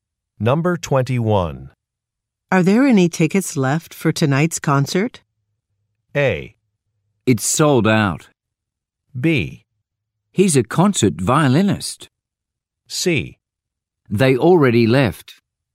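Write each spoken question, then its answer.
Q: Are there any tickets left for tonight's concert?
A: A: It's sold out.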